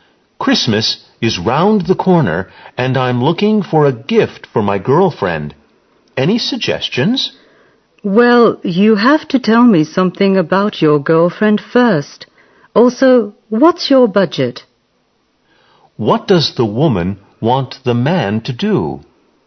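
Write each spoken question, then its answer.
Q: What does the woman want the man to do?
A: Tell her about his girlfriend and his budget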